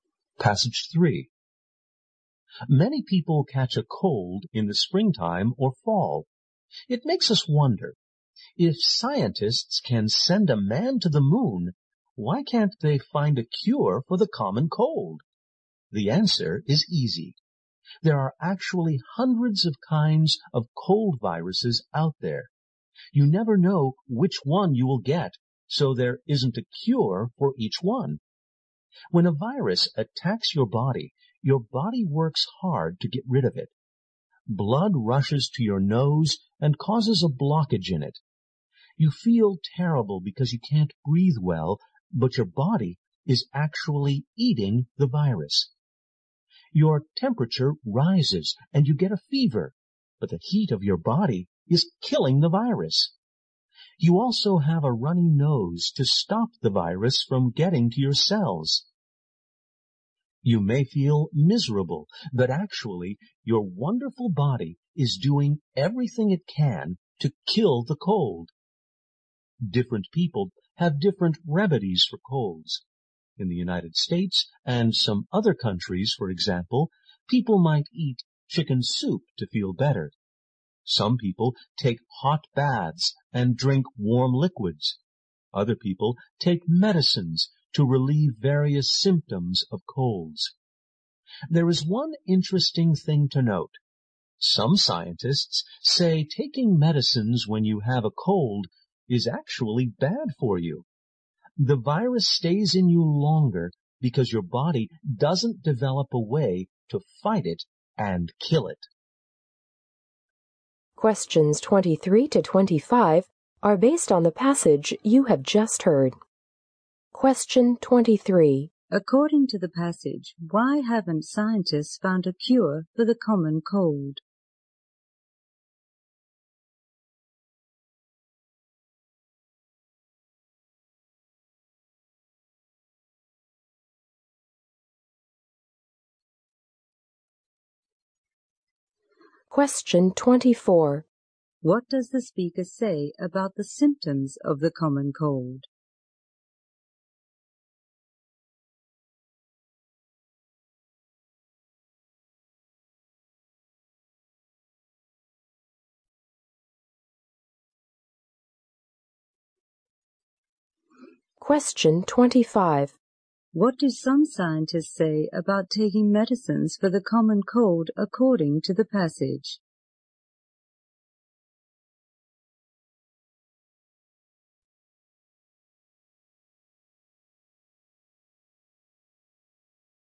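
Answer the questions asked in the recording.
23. There are hundreds of kinds of cold viruses
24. They show the body is fighting the virus
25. It is bad because the virus stays longer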